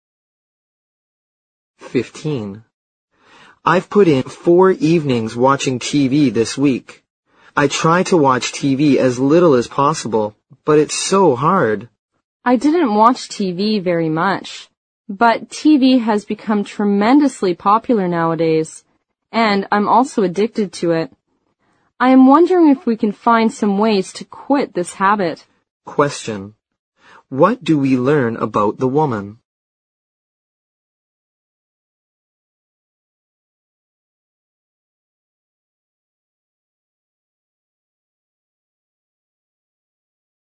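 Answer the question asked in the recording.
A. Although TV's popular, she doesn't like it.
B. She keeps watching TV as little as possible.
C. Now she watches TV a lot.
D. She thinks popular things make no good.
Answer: C. Now she watches TV a lot.

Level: 六级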